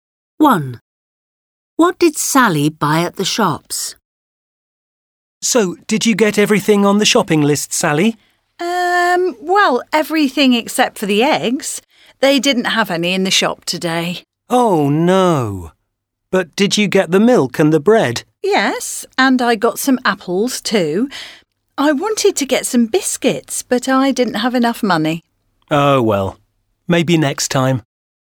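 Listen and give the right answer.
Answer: Milk, bread and apples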